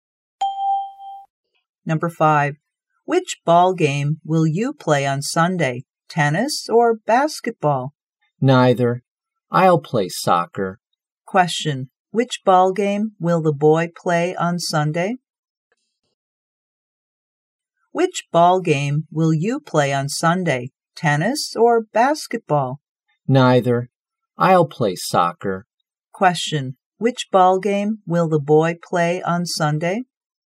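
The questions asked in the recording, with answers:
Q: Which ball game will the boy play on Sunday?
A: Soccer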